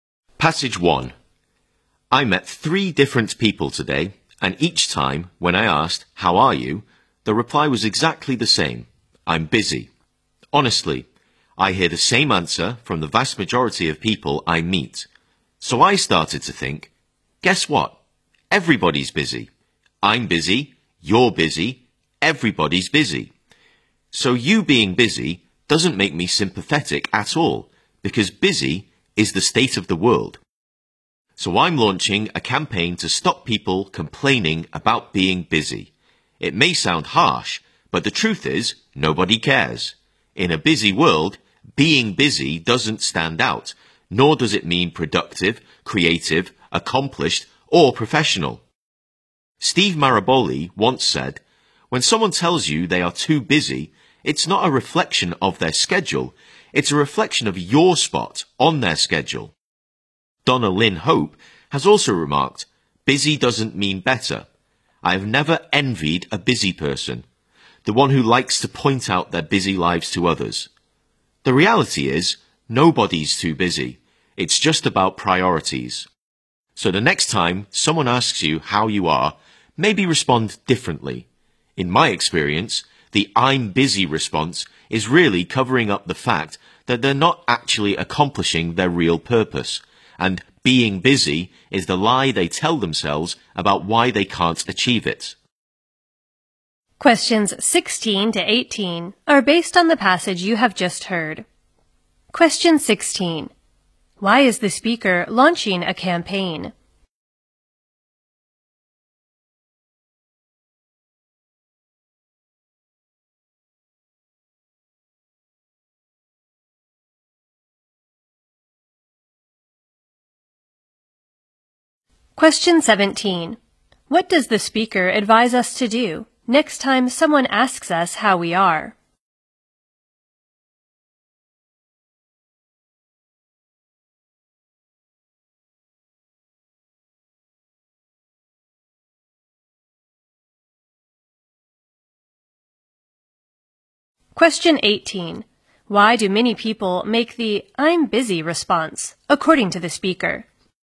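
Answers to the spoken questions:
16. To stop people complaining about being busy
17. Respond differently
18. To cover up that they are not accomplishing their real purpose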